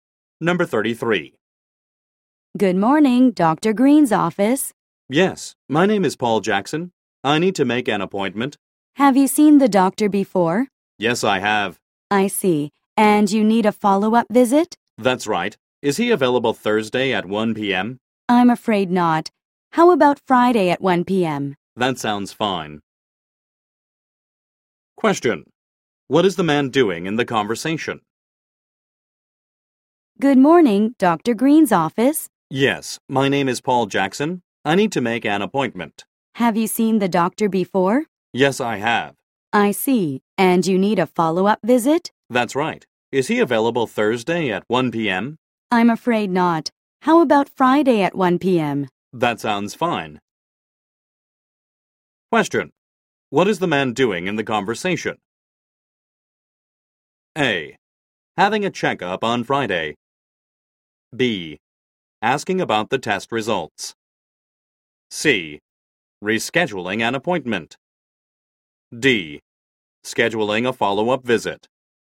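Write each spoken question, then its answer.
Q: What is the man doing in the conversation?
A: D: Scheduling a follow-up visit.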